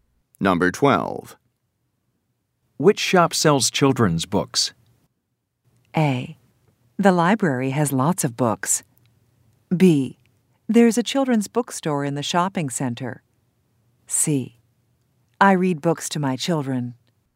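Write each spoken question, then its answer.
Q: Which shop sells children's books?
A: B: There's a children's bookstore in the shopping center.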